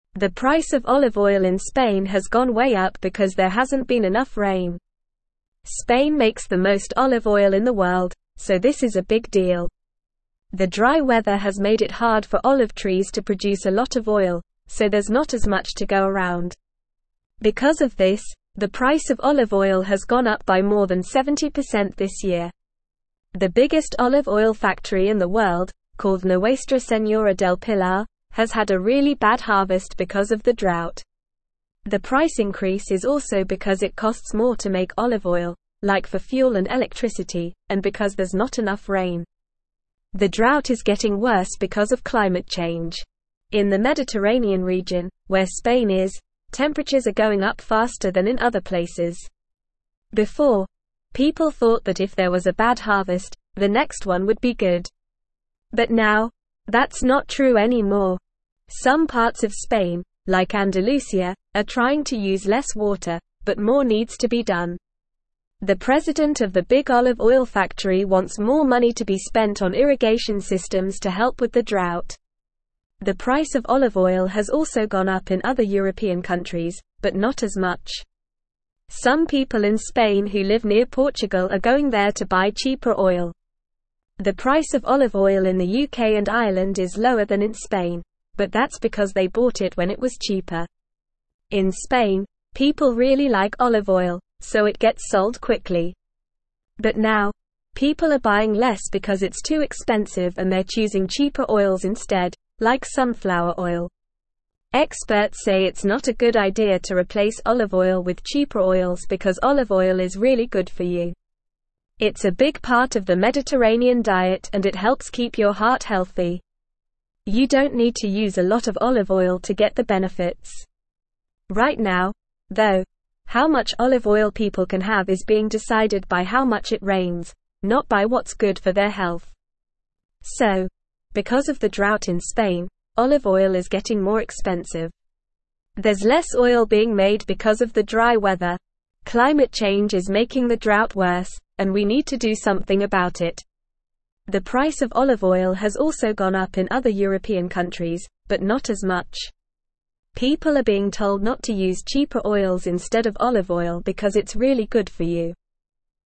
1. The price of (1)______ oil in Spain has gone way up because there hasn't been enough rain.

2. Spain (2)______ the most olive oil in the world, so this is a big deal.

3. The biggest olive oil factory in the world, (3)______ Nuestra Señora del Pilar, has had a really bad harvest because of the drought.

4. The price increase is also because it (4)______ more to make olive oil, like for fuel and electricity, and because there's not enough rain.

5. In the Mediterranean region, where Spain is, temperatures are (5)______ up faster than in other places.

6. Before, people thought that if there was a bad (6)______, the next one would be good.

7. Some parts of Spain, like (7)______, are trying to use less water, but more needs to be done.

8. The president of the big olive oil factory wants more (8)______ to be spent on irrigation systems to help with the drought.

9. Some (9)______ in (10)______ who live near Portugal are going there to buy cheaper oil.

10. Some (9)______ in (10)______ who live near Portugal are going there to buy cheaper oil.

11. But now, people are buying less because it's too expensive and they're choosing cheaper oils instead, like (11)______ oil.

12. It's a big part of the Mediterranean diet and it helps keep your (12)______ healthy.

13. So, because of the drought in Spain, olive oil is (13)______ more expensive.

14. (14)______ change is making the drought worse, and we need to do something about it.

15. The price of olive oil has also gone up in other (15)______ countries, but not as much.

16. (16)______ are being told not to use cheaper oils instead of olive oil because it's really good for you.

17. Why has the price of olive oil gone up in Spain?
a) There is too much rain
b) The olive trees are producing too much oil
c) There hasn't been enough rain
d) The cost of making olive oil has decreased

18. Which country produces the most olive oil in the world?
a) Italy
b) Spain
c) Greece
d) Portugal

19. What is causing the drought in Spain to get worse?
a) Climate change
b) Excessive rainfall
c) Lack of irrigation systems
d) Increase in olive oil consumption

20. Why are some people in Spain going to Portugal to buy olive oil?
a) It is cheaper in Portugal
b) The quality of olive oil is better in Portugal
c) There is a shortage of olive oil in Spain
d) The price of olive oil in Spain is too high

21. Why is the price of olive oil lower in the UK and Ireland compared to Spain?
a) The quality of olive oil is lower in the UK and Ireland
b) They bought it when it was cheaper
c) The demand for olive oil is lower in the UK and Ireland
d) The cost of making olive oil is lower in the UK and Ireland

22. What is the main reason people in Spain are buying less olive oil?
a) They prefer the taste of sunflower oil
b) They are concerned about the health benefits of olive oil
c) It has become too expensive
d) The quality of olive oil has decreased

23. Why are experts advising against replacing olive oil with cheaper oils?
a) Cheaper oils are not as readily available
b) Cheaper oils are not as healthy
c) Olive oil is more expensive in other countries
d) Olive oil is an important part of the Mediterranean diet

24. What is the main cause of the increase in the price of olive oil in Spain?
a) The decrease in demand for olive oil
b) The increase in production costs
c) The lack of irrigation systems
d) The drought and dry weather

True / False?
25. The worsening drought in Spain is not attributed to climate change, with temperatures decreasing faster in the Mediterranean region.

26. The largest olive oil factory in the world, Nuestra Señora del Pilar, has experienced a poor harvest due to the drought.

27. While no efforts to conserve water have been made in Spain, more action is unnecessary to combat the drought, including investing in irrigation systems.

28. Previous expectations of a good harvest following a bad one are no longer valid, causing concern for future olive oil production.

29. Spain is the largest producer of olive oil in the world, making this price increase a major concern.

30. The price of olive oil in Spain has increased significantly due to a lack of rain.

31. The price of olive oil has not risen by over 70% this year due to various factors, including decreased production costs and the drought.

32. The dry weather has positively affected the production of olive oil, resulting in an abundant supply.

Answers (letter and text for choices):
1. olive
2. makes
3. called
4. costs
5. going
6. harvest
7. Andalusia
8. money
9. people
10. Spain
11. sunflower
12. heart
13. getting
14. Climate
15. European
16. People
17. c) There hasn't been enough rain
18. b) Spain
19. a) Climate change
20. a) It is cheaper in Portugal
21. b) They bought it when it was cheaper
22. c) It has become too expensive
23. d) Olive oil is an important part of the Mediterranean diet
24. d) The drought and dry weather
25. False
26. True
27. False
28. True
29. True
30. True
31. False
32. False

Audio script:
The price of olive oil in Spain has gone way up because there hasn't been enough rain. Spain makes the most olive oil in the world, so this is a big deal. The dry weather has made it hard for olive trees to produce a lot of oil, so there's not as much to go around. Because of this, the price of olive oil has gone up by more than 70% this year. The biggest olive oil factory in the world, called Nuestra Señora del Pilar, has had a really bad harvest because of the drought. The price increase is also because it costs more to make olive oil, like for fuel and electricity, and because there's not enough rain.
The drought is getting worse because of climate change. In the Mediterranean region, where Spain is, temperatures are going up faster than in other places. Before, people thought that if there was a bad harvest, the next one would be good. But now, that's not true anymore. Some parts of Spain, like Andalusia, are trying to use less water, but more needs to be done. The president of the big olive oil factory wants more money to be spent on irrigation systems to help with the drought.
The price of olive oil has also gone up in other European countries, but not as much. Some people in Spain who live near Portugal are going there to buy cheaper oil. The price of olive oil in the UK and Ireland is lower than in Spain, but that's because they bought it when it was cheaper. In Spain, people really like olive oil, so it gets sold quickly. But now, people are buying less because it's too expensive and they're choosing cheaper oils instead, like sunflower oil.
Experts say it's not a good idea to replace olive oil with cheaper oils because olive oil is really good for you. It's a big part of the Mediterranean diet and it helps keep your heart healthy. You don't need to use a lot of olive oil to get the benefits. Right now, though, how much olive oil people can have is being decided by how much it rains, not by what's good for their health.
So, because of the drought in Spain, olive oil is getting more expensive. There's less oil being made because of the dry weather. Climate change is making the drought worse, and we need to do something about it. People are being told not to use cheaper oils instead of olive oil because it's really good for you.

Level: Level 3